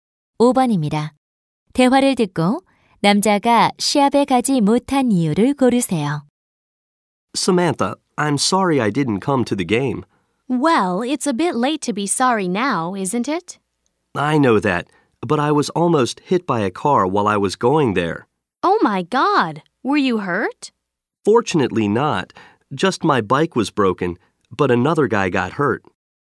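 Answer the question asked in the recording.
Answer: 가는 길에 차에 치일 뻔했고 자전거가 부서져서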